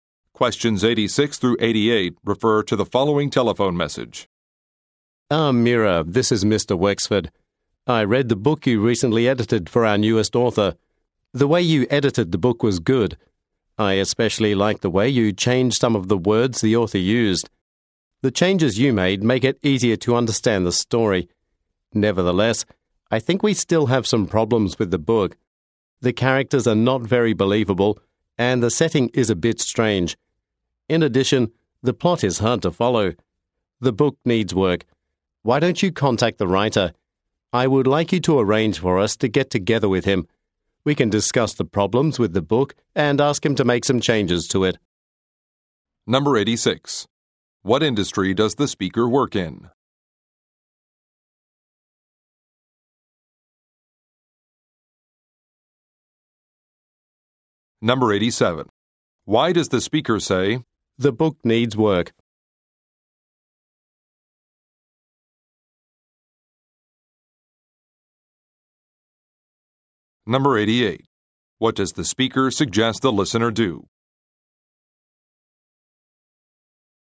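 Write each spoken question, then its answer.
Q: What industry does the speaker work in?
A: Publishing (book editing)

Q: Why does the speaker say, "The book needs work"?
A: The book still has problems that need to be fixed

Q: What does the speaker suggest the listener do?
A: Contact the writer to arrange a meeting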